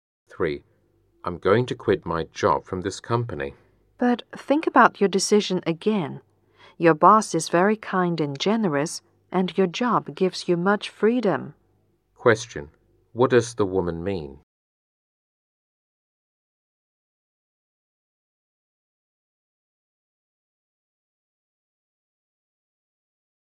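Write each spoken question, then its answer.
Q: What does the woman mean?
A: The man shouldn't quit his job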